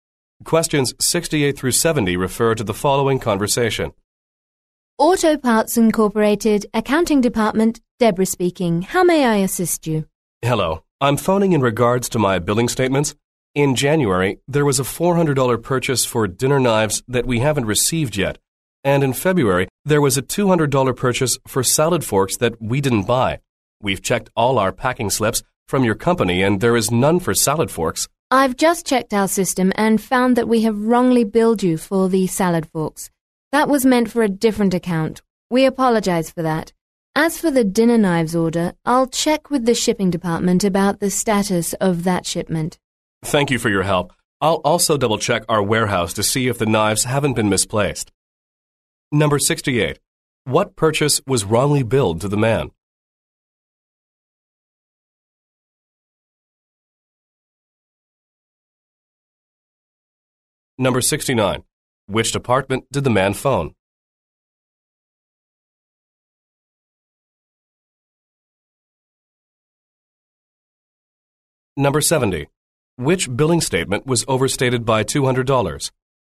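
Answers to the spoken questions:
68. Salad forks
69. The accounting department
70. February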